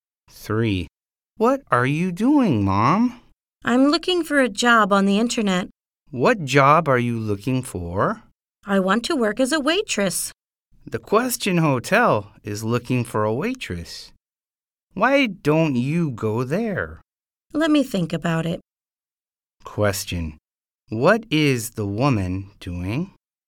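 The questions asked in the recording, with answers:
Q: What is the woman doing?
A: Looking for a job on the internet.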